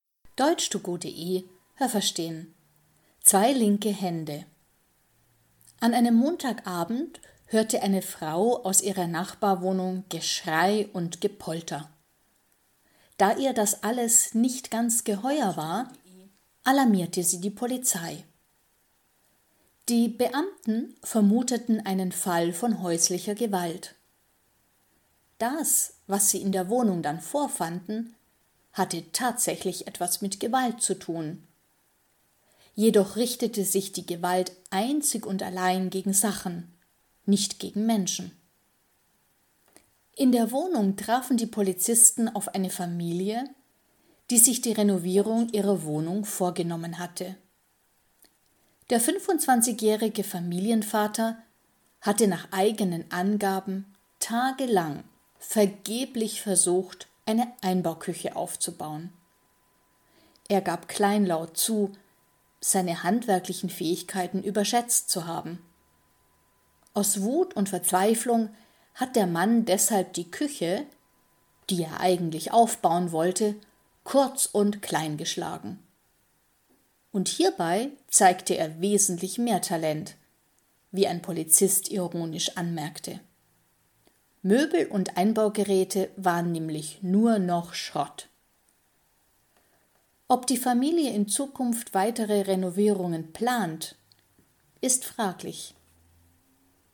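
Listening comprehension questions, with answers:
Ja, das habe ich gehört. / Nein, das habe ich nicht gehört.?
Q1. Eine Frau rief die Polizei, weil sie in der Wohnung der Nachbarn Lärm hörte.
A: Ja, das habe ich gehört.

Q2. Die Gewalt in der Wohnung richtete sich gegen Menschen.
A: Nein, das habe ich nicht gehört.

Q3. In der Wohnung befand sich ein 25-jähriger Mann mit seiner Familie.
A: Ja, das habe ich gehört.

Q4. Der Mann hatte stundenlang versucht, eine Einbauküche aufzubauen.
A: Nein, das habe ich nicht gehört.

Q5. Als die Polizei kam, wurde der Mann aggressiv und schlug die Polizisten.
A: Nein, das habe ich nicht gehört.

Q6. Der Mann hat gedacht, dass er über gute handwerkliche Fähigkeiten verfügt.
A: Ja, das habe ich gehört.

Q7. Der Mann hat aus Wut und Verzweiflung alle Möbel und Geräte kaputt gemacht.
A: Ja, das habe ich gehört.

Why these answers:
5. Er war kleinlaut, das heißt er war plötzlich verlegen und es war ihm peinlich.

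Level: B2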